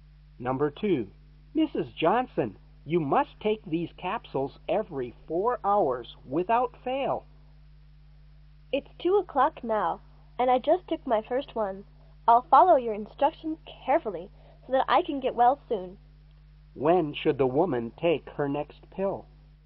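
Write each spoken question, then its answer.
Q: When should the woman take her next pill?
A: At 6:00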